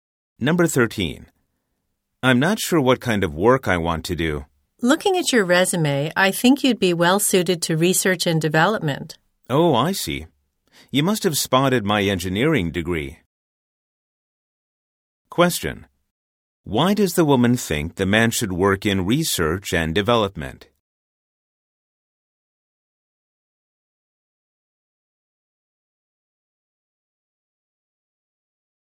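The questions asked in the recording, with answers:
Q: Why does the woman think the man should work in research and development?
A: He has an engineering degree.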